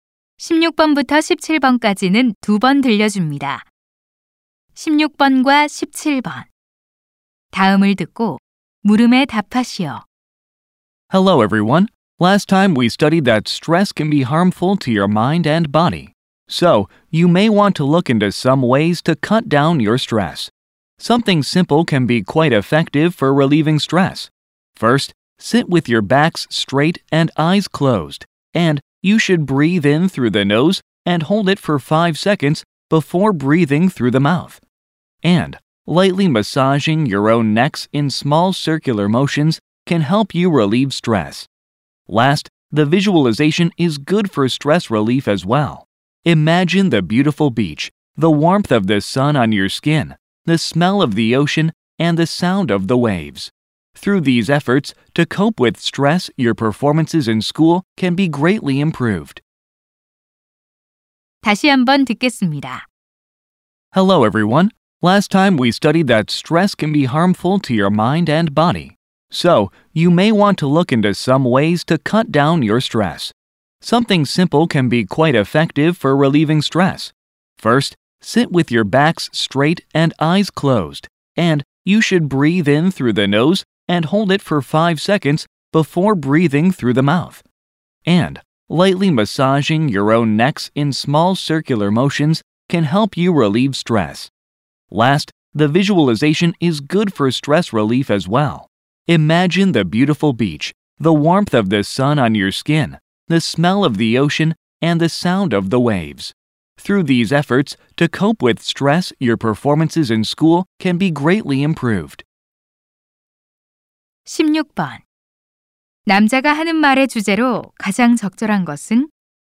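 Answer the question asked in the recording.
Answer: 스트레스를 줄이는 간단한 방법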